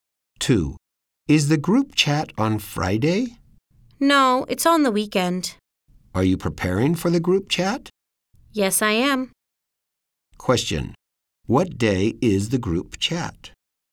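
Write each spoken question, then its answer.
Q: What day is the group chat?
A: On the weekend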